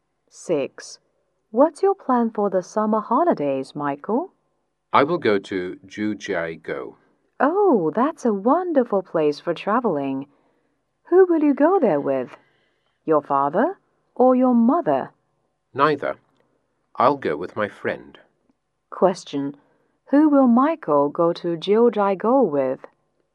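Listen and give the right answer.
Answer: His friend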